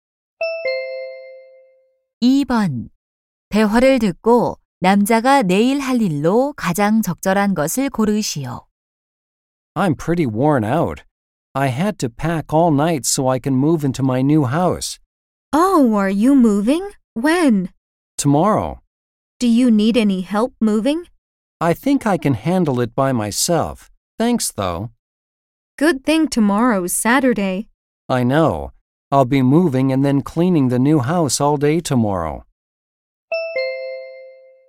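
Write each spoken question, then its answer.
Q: 대화를 듣고 남자가 내일 할 일로 가장 적절한 것을 고르시오.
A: 새 집으로 이사하고 청소하기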